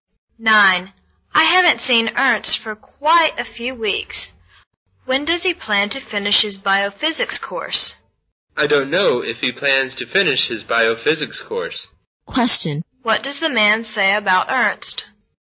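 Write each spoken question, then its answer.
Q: What does the man say about Ernst?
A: Ernst may not finish his biophysics course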